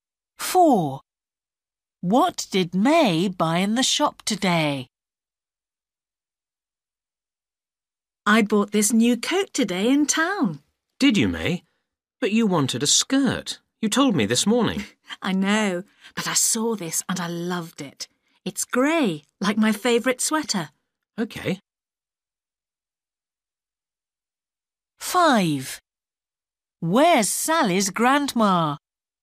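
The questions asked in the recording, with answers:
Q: What did May buy in the shop today?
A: A grey coat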